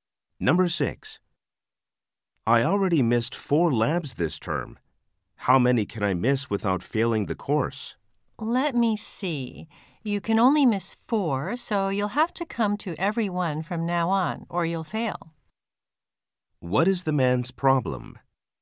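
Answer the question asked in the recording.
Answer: He can't miss any more labs or he'll fail the course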